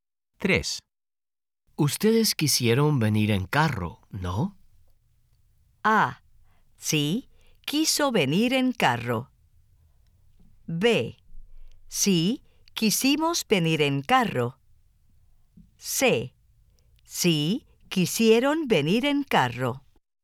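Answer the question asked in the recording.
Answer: B: Sí, quisimos venir en carro.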